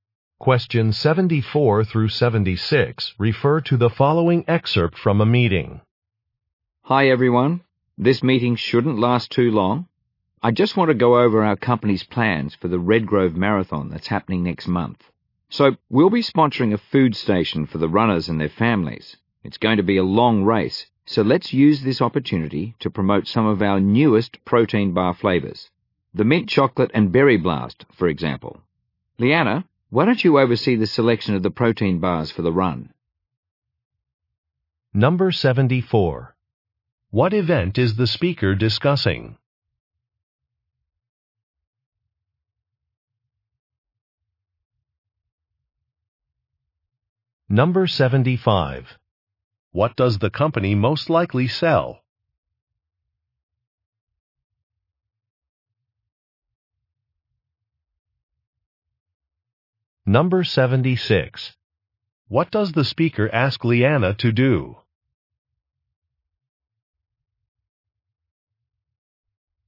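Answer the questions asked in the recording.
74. A marathon
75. Protein bars
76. Oversee the selection of protein bars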